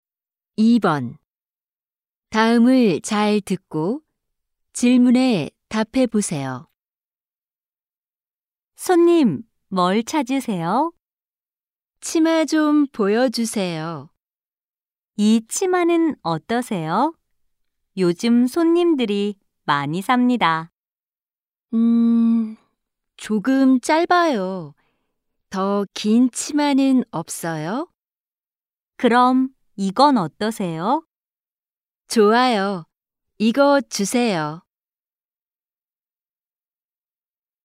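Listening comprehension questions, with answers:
[8-1~8-2] 다음을 잘 듣고 질문에 답해 보세요.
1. 이 사람은 지금 어디에 있습니까?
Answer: 옷 가게

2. 이 사람은 무엇을 사고 싶어 합니까?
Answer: 긴 치마

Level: 1B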